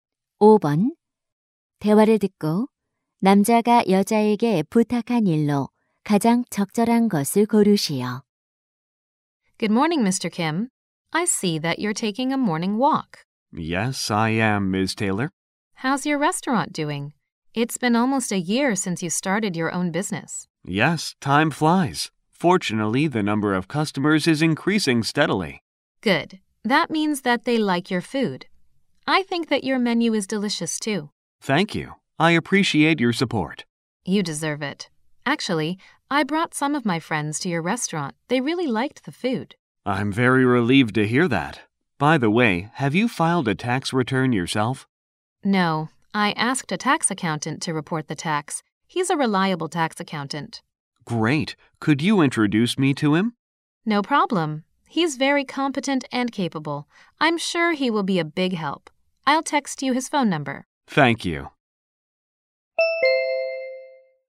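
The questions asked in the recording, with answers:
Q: 대화를 듣고 남자가 여자에게 부탁한 일로 가장 적절한 것을 고르시오.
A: 세무사를 소개해 주기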